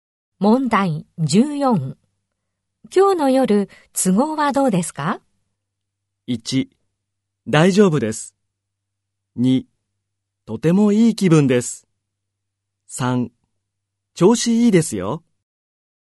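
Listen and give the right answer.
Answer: 1: 大丈夫です。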